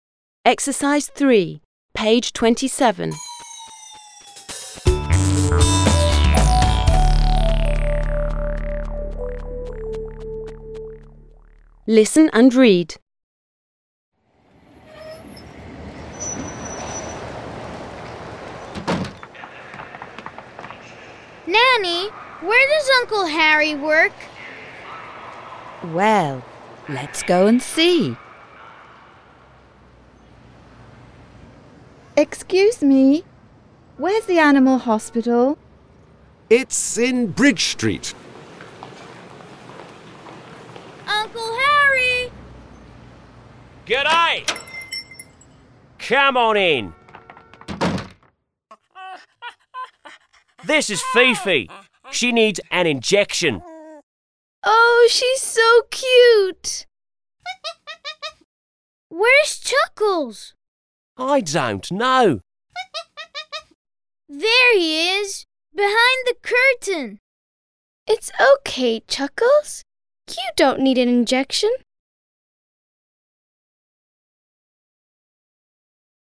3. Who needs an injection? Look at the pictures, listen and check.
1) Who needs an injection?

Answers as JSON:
{"1": "Fifi needs an injection."}

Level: 4 класс